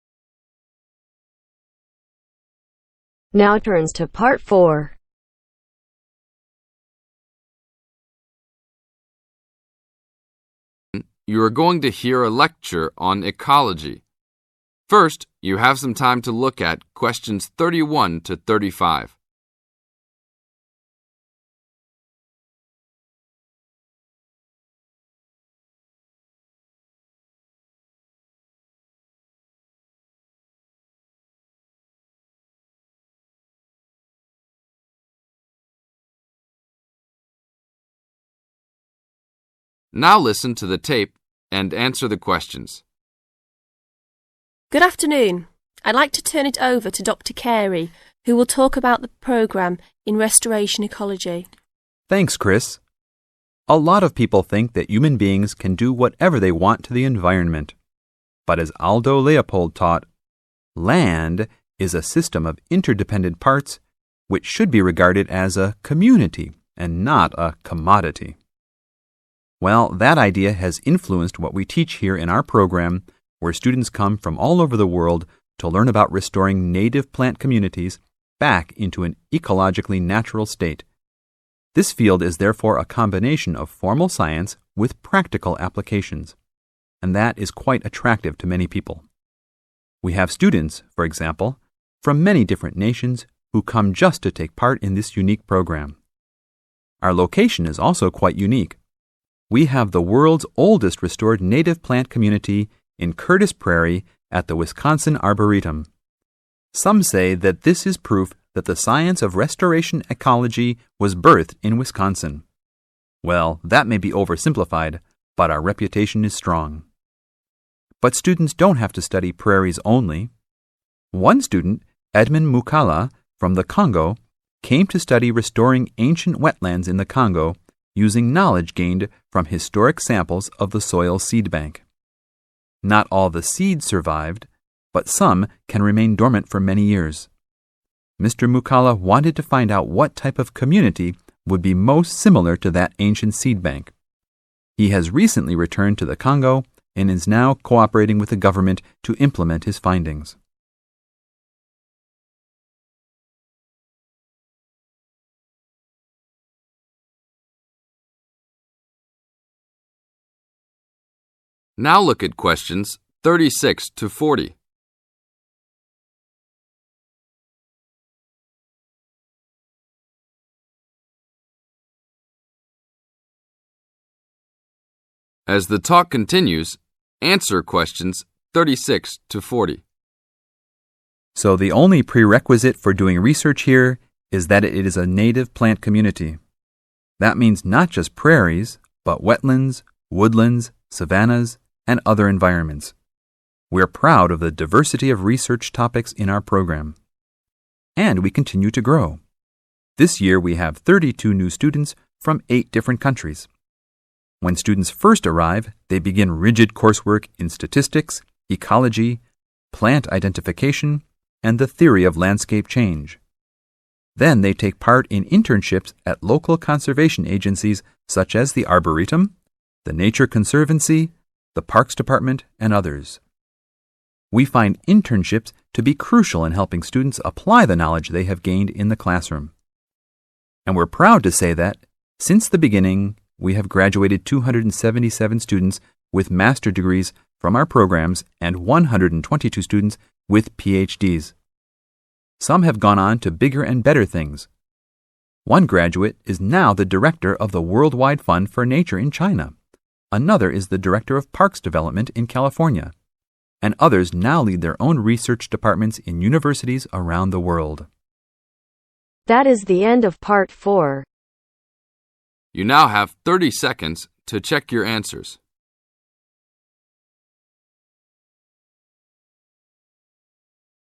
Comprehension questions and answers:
Complete the notes below. Write NO MORE THAN TWO WORDS for each answer.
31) Influence: Leopold's concept that land should be viewed as a 31...............................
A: Community

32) Practice: Restore native 32...............................to original condition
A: Plant communities

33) Curtis Prairie is the 33...............................restored prairie in America.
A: Oldest

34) Edmond Moukala researched restoring 34...............................in the Congo based on the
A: Ancient wetlands

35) 35...............................found in the soil of those former communities in his homeland.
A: Seeds

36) Coursework in statistics, theory, ecology and 36...............................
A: Plant

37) 37...............................help students gain practical experience.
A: Internships

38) Has so far granted 38...............................Masters Degrees and 122 Ph.D.'s.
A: 277

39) One former student is now the 39...............................of the World Wide Fund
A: Director

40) while many others continue to conduct 40...............................in their own university programmes.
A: Research